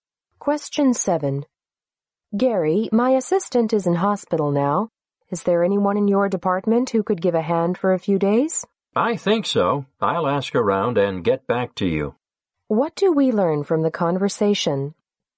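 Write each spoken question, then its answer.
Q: What do we learn from the conversation?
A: The man will try to find someone to help the woman.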